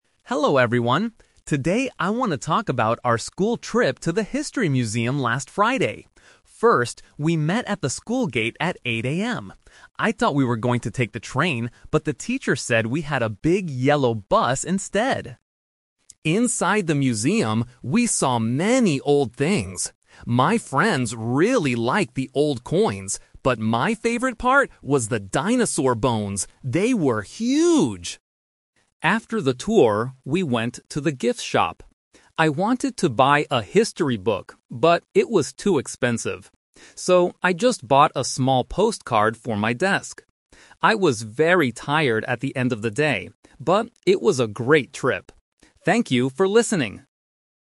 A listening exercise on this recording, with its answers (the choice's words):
Listen to a student giving a presentation to the class about a school trip. Choose the correct answer (A, B, or C) for each question.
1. How did the students travel to the museum?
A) By train.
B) By bus.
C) By car.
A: By bus.

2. What did the speaker like the most in the museum?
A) The old coins.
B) The dinosaur bones.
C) The history books.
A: The dinosaur bones.

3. What did the speaker buy at the gift shop?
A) A history book.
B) A postcard.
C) Nothing, because everything was too expensive.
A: A postcard.

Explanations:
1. The student says, "I thought we were going to take the train, but the teacher said we had a big yellow bus instead." The actual means of transport is the bus. Answer (A) is a trap because "train" is the means of transport he initially thought of taking. Answer (C) is not mentioned.
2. The speaker asserts, "...my favorite part was the dinosaur bones." (My favorite part was the dinosaur bones.) Answer (A) is a trap because "old coins" are something my friends like.
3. This is a plot twist. The student wants to buy a history book, but it's too expensive, so he concludes: "So, I just bought a small postcard." Answer (A) is the original intention. Answer (C) is incorrect because he was still able to buy postcards.

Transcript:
Student: Hello everyone. Today I want to talk about our school trip to the History Museum last Friday. First, we met at the school gate at 8 AM. I thought we were going to take the train, but the teacher said we had a big yellow bus instead.
Inside the museum, we saw many old things. My friends really liked the old coins, but my favorite part was the dinosaur bones. They were huge!
After the tour, we went to the gift shop. I wanted to buy a history book, but it was too expensive. So, I just bought a small postcard for my desk. I was very tired at the end of the day, but it was a great trip. Thank you for listening.